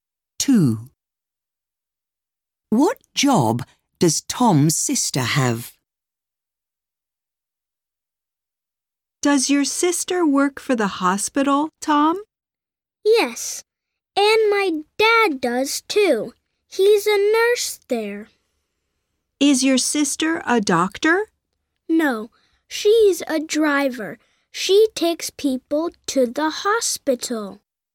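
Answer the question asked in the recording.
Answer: She's a driver who takes people to the hospital.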